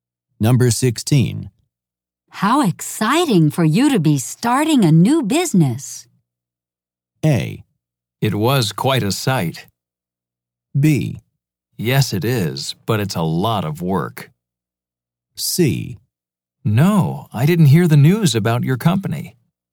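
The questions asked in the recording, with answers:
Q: How exciting for you to be starting a new business.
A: B: Yes, it is, but it's a lot of work.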